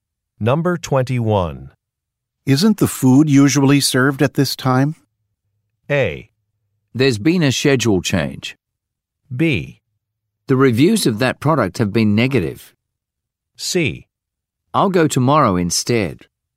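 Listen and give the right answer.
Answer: A: There's been a schedule change.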